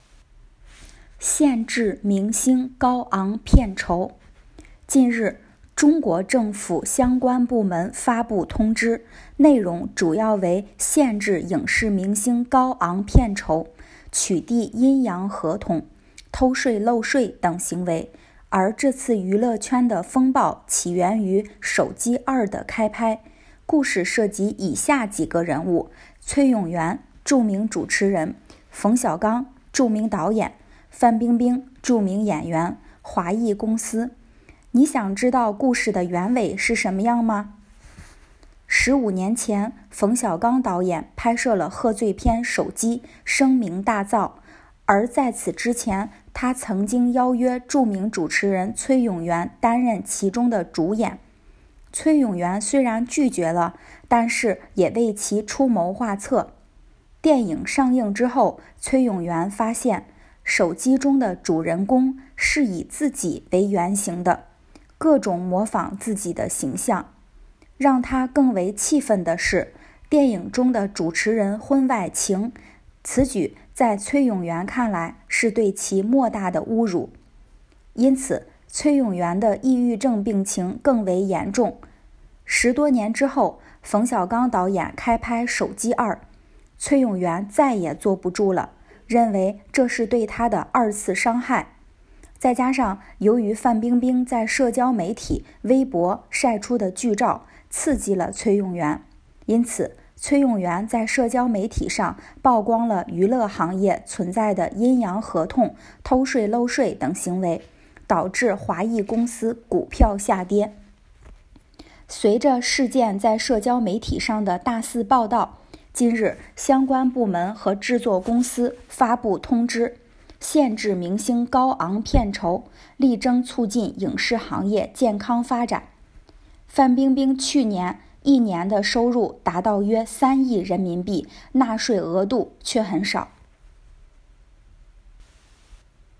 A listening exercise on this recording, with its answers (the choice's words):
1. 崔永元为什么对电影<手机>的上映感到愤怒?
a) 导演没有为他支付演出费用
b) 电影情节是对崔永元的人格侮辱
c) 电影票房不好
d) 这部电影拍摄过程中出现偷税漏税行为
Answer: 电影情节是对崔永元的人格侮辱

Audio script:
限制明星高昂片酬 近日,中国政府相关部门发布通知,内容主要为限制影视明星高昂片酬,取缔"阴阳合同",偷税漏税等行为。而这次娱乐圈的风暴起源于《手机 2 》的开拍,故事涉及以下几个人物,崔永元(著名主持人),冯小刚(著名导演),范冰冰(著名演员),华谊公司。你想知道故事的原委是什么样吗? 十五年前,冯小刚导演拍摄了贺岁片《手机》,声名大噪。而在此之前,他曾经邀约著名主持人崔永元担任其中的主演。崔永元虽然拒绝了,但是也为其出谋划策。电影上映之后,崔永元发现,《手机》中的主人公,是以自己为原型的,各种模仿自己的形象。让他更为气愤的是,电影中的主持人婚外情,此举,在崔永元看来是对其莫大的侮辱。因此,崔永元的抑郁症病情更为严重。 十多年之后,冯小刚导演开拍《手机 2 》。崔永元再也坐不住了,认为这是对他的二次伤害。再加上,由于范冰冰在社交媒体,微博,晒出的剧照,刺激了崔永元。因此,崔永元在社交媒体上曝光了娱乐行业存在的"阴阳合同"偷税漏税等行为。导致华谊公司股票下跌。 随着事件在社交媒体上的大肆报道,近日,相关部门和制作公司发布通知,限制明星高昂片酬,力争促进影视行业健康发展。

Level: HSK 6